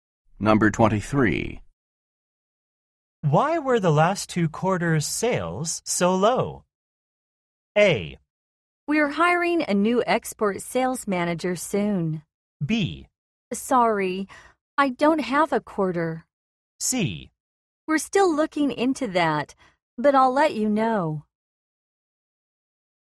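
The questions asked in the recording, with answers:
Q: Why were the last two quarters' sales so low?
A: C: We're still looking into that, but I'll let you know.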